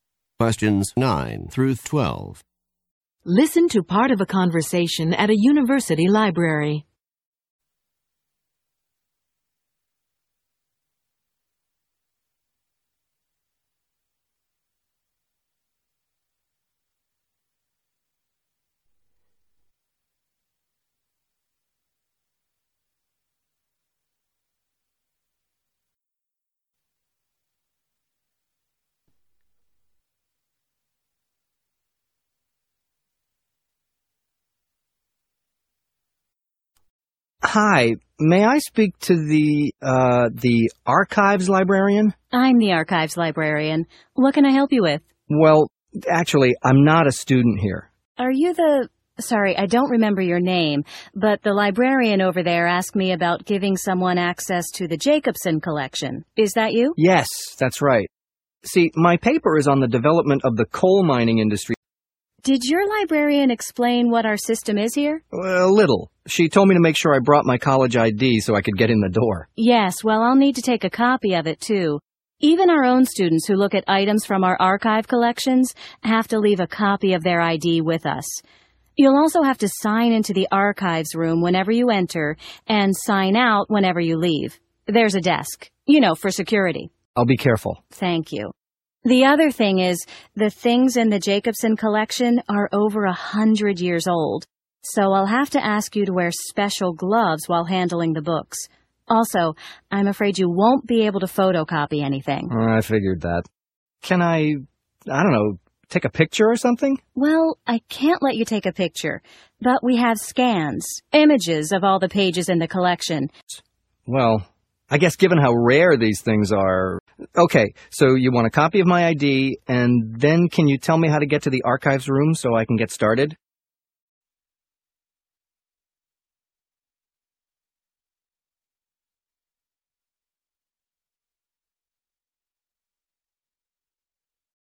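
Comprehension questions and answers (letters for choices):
Conversation 3: Listen to part of a conversation at a university library.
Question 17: What does the man plan to write his paper on?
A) The preservation of old books.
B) The local coal industry.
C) The famous archives librarian.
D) The collection of rare books.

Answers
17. B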